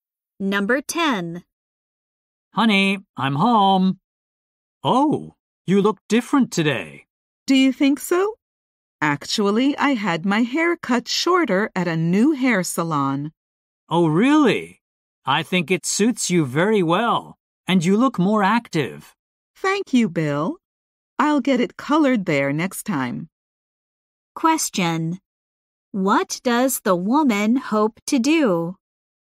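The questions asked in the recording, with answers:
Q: What does the woman hope to do?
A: Get her hair colored at the salon next time.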